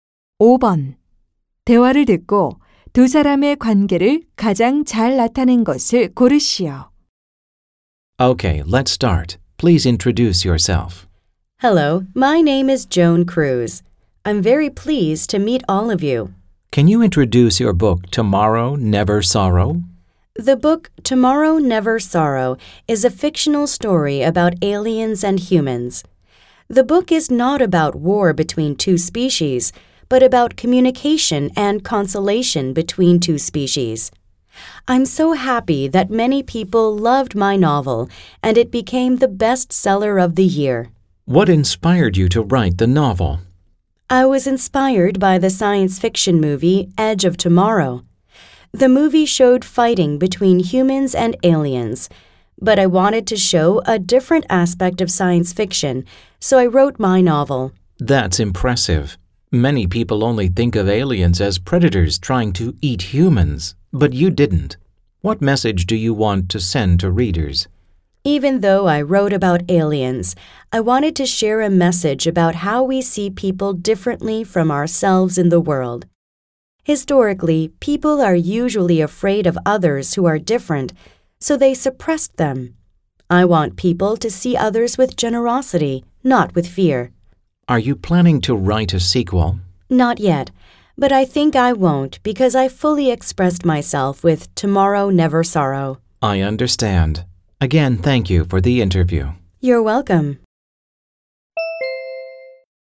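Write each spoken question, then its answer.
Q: 대화를 듣고 두 사람의 관계를 가장 잘 나타낸 것을 고르시오.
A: 인터뷰 진행자 - 소설가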